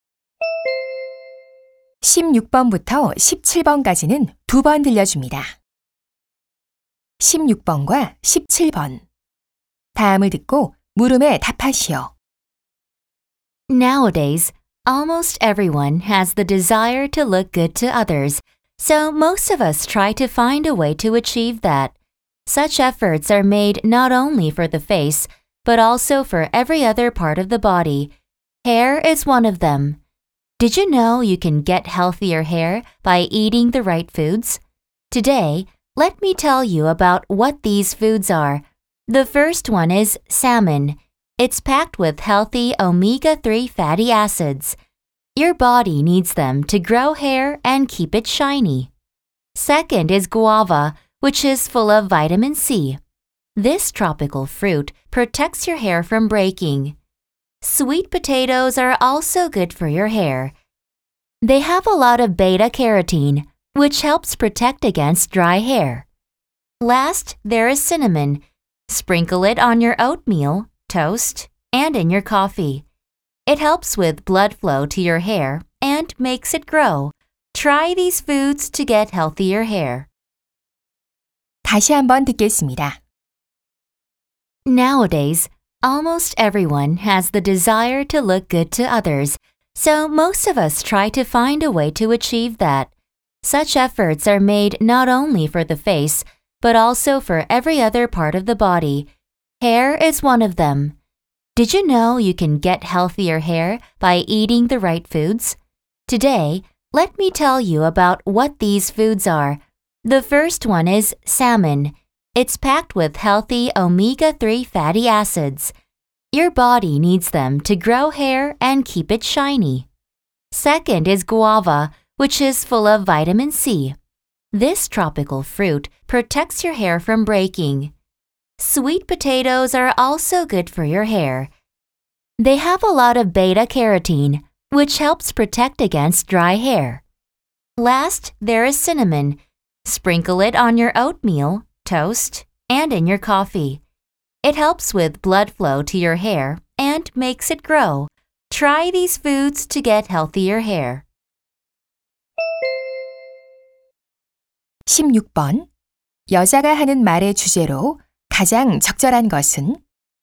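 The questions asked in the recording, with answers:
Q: 여자가 하는 말의 주제로 가장 적절한 것은?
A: 머리카락 건강에 좋은 음식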